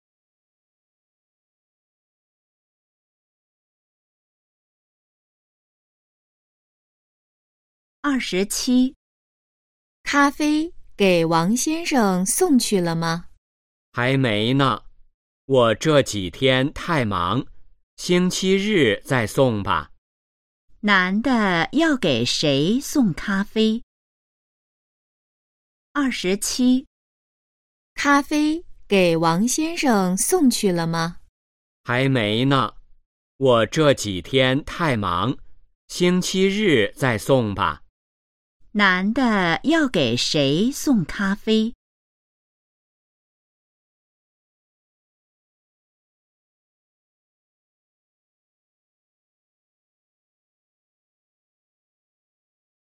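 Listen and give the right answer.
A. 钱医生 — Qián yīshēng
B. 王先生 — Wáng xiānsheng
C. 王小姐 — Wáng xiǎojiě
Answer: B. 王先生 — Wáng xiānsheng

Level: HSK2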